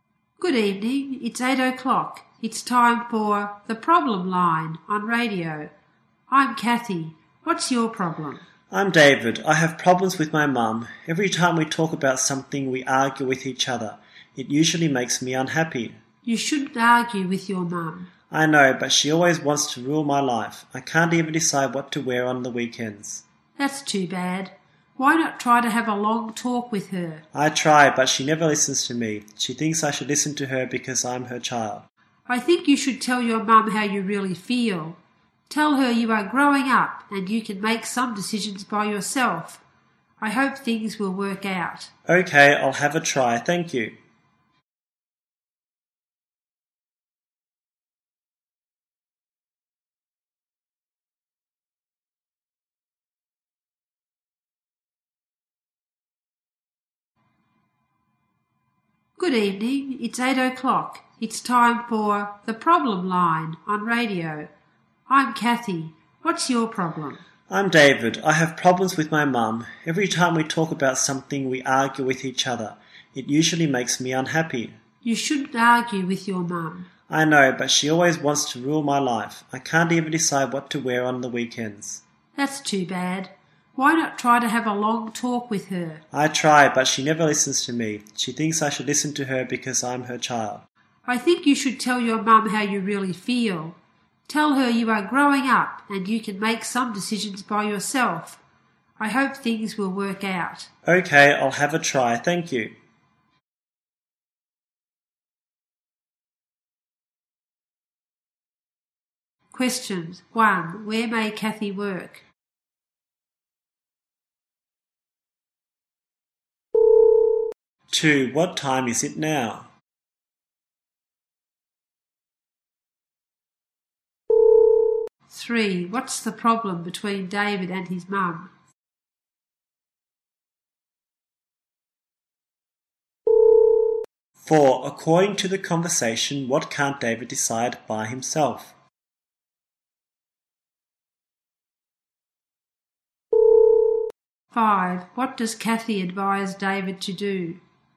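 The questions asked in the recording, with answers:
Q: 1. Where may Kathy work?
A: At a radio station

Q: Two. What time is it now?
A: 8 o'clock

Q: Three. What's the problem between David and his mum?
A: They argue with each other

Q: Four. According to the conversation, what can't David decide by himself?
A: What to wear on the weekends

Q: Five. What does Kathy advise David to do?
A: Tell his mum how he really feels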